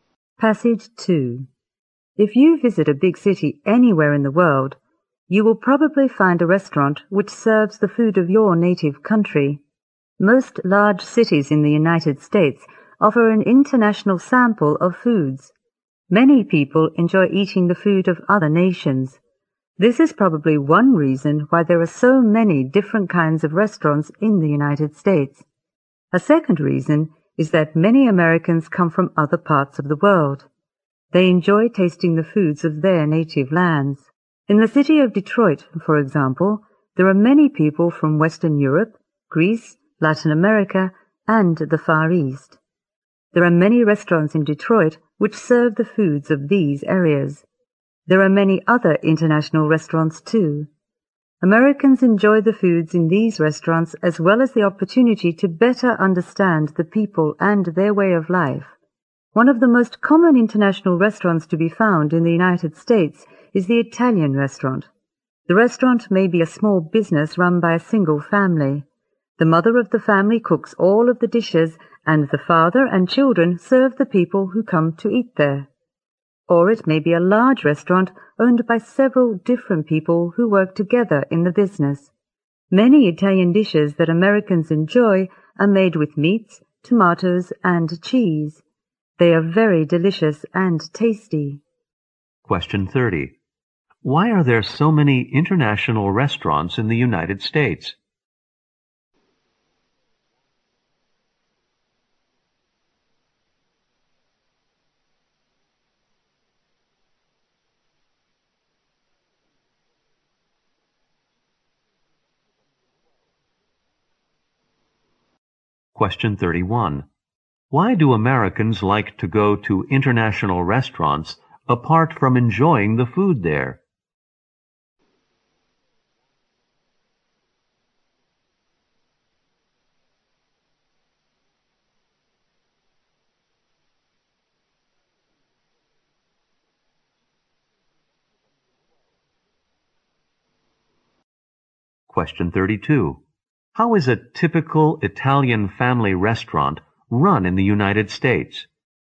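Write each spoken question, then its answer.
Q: Why are there so many international restaurants in the United States?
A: Many Americans come from other parts of the world and enjoy foods from other nations.

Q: Why do Americans like to go to international restaurants apart from enjoying the food there?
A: To better understand other people and their way of life

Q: How is a typical Italian family restaurant run in the United States?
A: The mother cooks, and the father and children serve.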